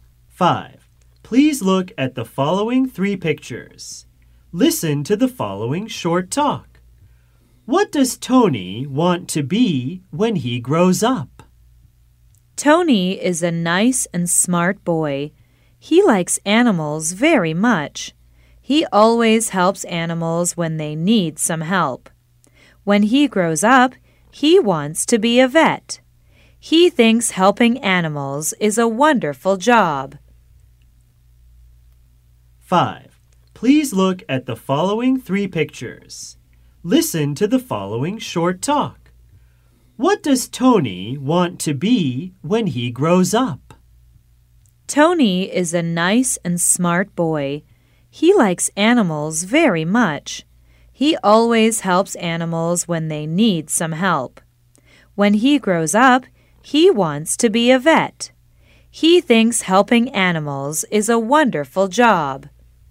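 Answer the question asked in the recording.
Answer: A vet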